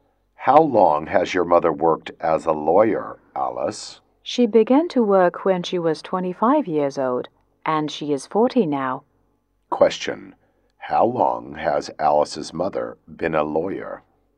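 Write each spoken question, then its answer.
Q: How long has Alice's mother been a lawyer?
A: 15 years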